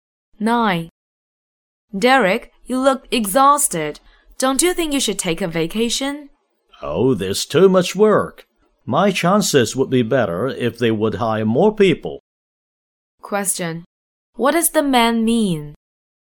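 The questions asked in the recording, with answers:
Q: What does the man mean?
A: He has too much work to take a vacation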